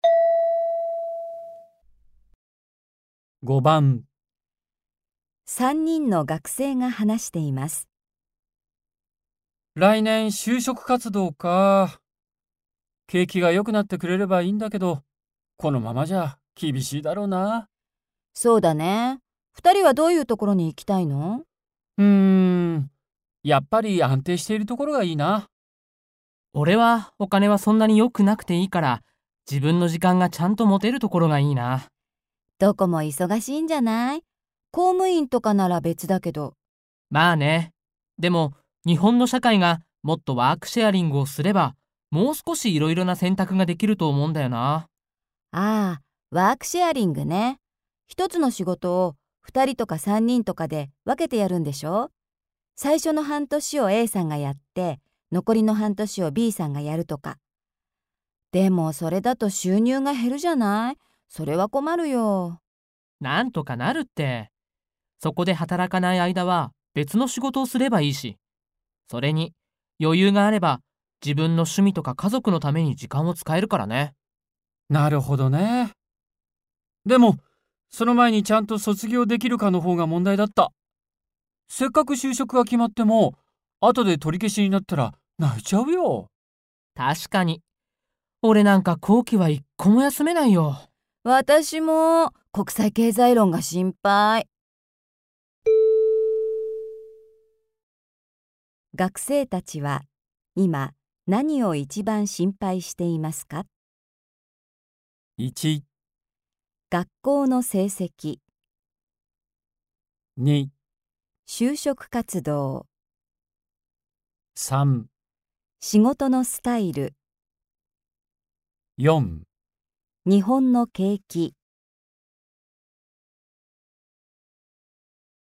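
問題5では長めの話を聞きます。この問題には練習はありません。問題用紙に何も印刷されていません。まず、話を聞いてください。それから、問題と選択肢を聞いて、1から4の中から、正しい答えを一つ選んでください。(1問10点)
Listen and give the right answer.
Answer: 学校の成績

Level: N2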